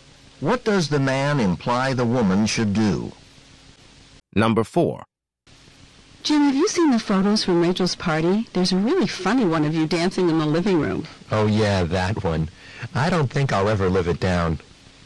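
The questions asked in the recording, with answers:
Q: What does the man mean?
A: He is embarrassed by the photo and people will keep teasing him about it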